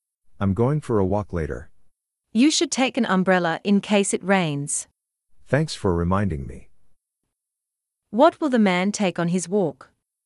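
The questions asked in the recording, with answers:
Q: What will the man take on his walk?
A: An umbrella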